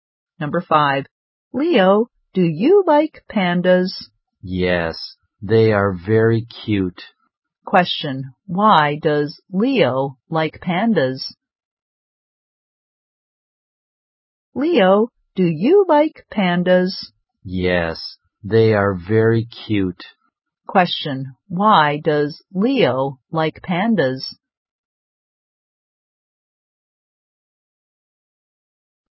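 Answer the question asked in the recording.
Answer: They are very cute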